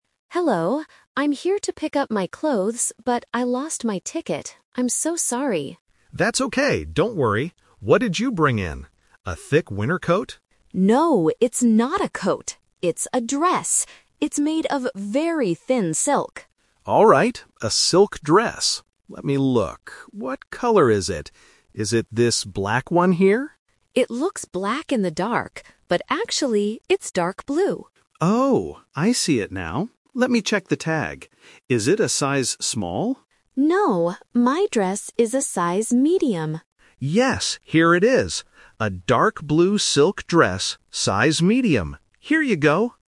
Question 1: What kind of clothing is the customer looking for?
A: A thin silk dress.

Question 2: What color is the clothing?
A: Dark blue.

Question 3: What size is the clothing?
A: Medium.

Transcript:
Customer: Hello. I'm here to pick up my clothes, but I lost my ticket. I'm so sorry.
Staff: That's okay, don't worry. What did you bring in? A thick winter coat?
Customer: No, it's not a coat. It's a dress. It's made of very thin silk.
Staff: Alright, a silk dress. Let me look... What color is it? Is it this black one here?
Customer: It looks black in the dark, but actually, it's dark blue.
Staff: Oh, I see it now. Let me check the tag. Is it a size Small?
Customer: No, my dress is a size Medium.
Staff: Yes, here it is. A dark blue silk dress, size Medium. Here you go!